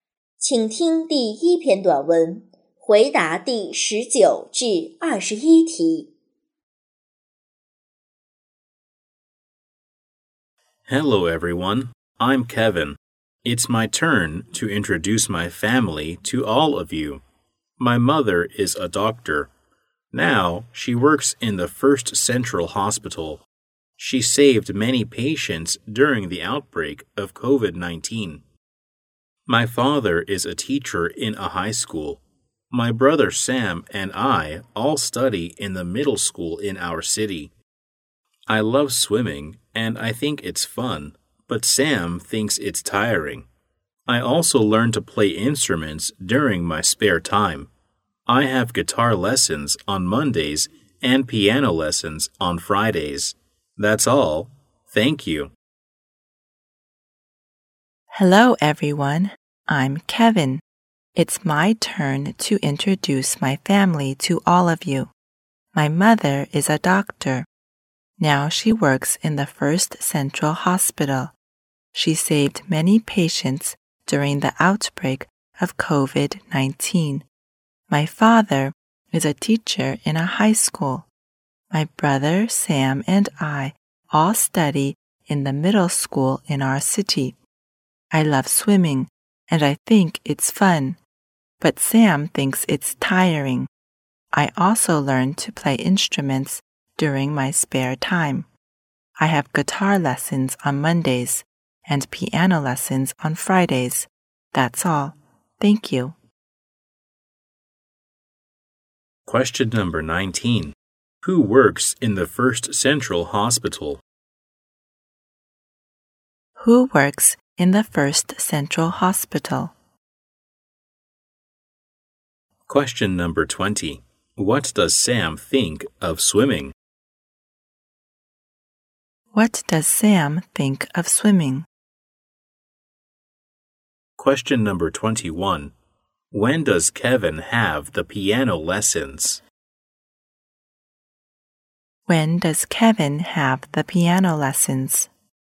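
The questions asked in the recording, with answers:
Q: Who works in the First Central Hospital?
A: Kevin's mother

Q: What does Sam think of swimming?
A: It's tiring

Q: When does Kevin have the piano lessons?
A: On Fridays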